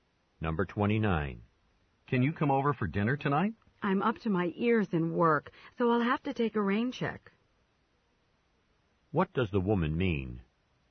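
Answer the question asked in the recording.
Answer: She's too busy to come tonight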